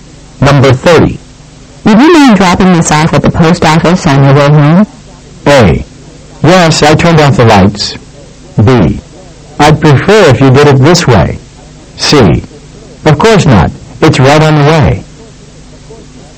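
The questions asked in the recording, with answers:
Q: Would you mind dropping this off at the post office on your way home?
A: C: Of course not. It's right on the way.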